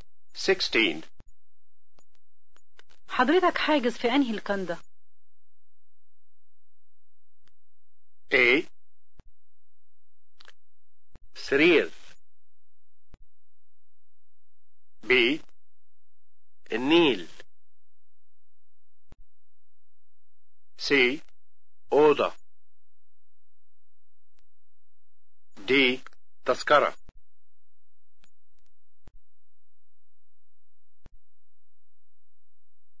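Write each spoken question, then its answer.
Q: حضرتك حاجز في انهي الكندا؟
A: B: النيل.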